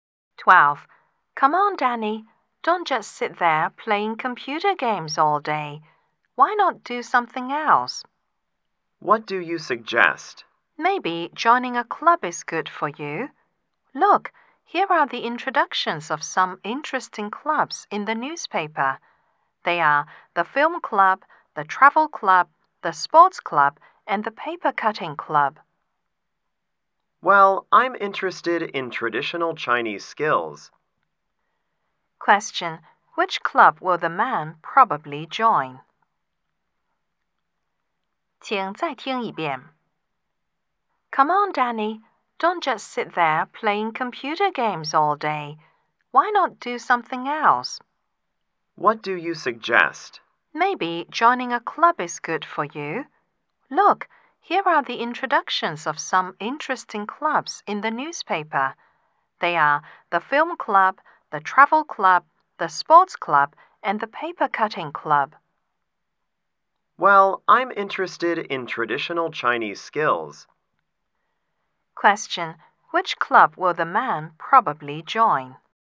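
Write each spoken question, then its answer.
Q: Which club will the man probably join?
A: The paper cutting club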